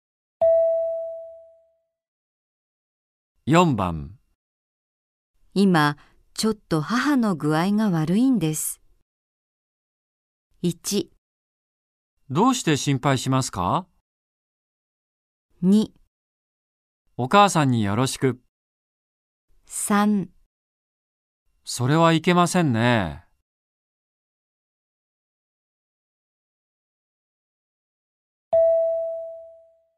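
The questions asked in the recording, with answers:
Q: 今、ちょっと母の具合が悪いんです。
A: 3: それはいけませんね。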